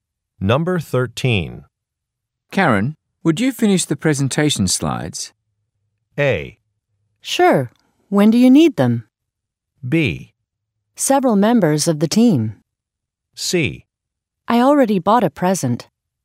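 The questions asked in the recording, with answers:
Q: Karen, would you finish the presentation slides?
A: A: Sure. When do you need them?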